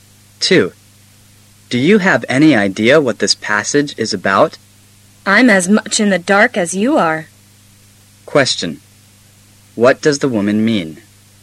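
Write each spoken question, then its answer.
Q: What does the woman mean?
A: She doesn't know what the passage is about either.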